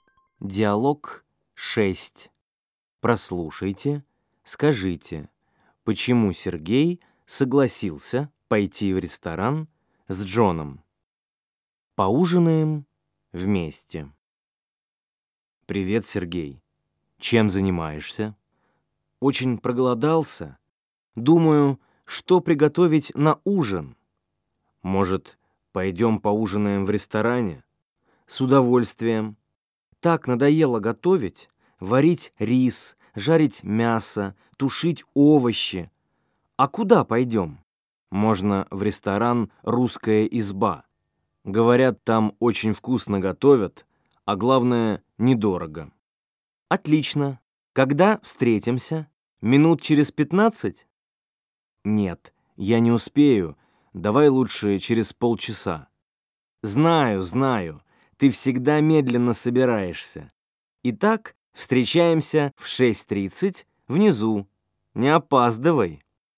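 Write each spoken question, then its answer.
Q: почему Сергей согласился пойти в ресторан с Джоном?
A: Ему надоело готовить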